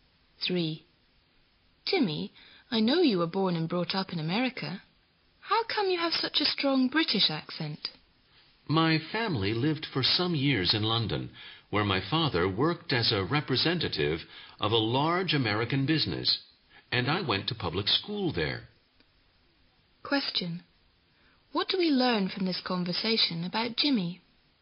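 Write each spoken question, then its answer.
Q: What do we learn from this conversation about Jimmy?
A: He went to school in London, so he has a British accent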